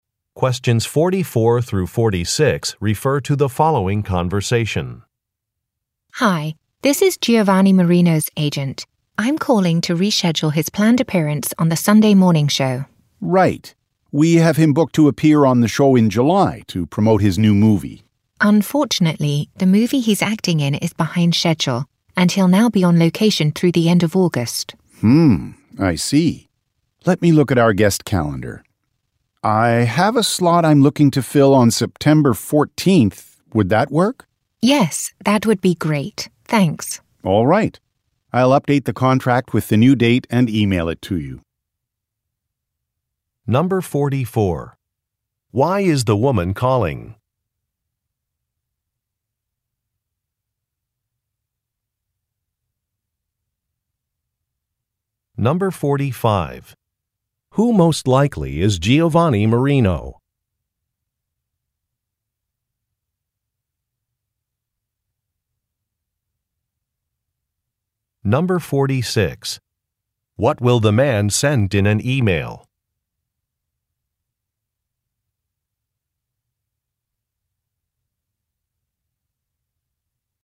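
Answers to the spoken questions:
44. To reschedule a TV show appearance
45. An actor
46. An updated contract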